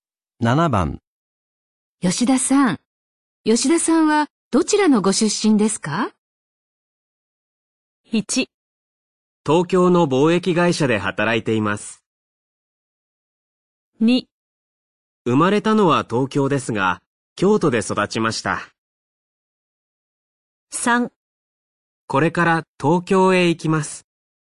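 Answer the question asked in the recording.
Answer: 2: 生まれたのは東京ですが、京都で育ちました。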